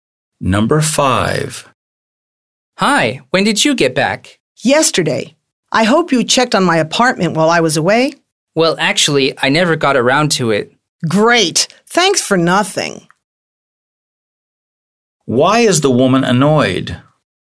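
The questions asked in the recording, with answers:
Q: Why is the woman annoyed?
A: The man never checked on her apartment while she was away.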